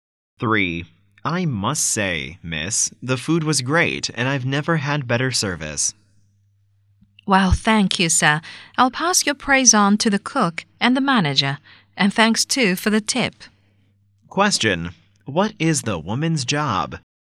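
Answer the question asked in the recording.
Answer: A waitress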